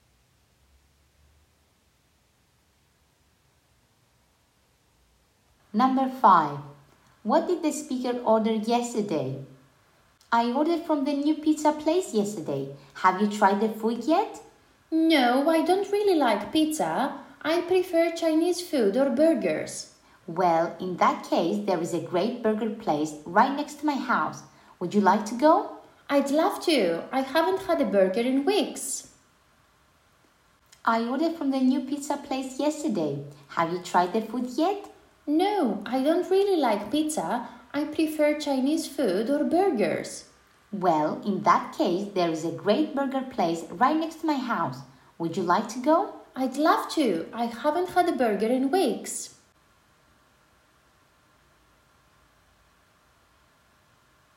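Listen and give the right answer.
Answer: Pizza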